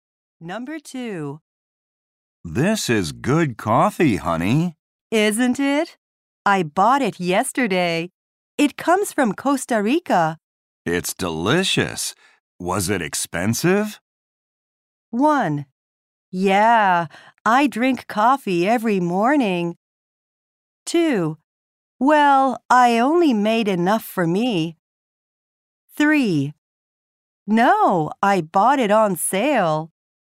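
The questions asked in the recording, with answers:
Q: It's delicious. Was it expensive?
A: 3: No, I bought it on sale.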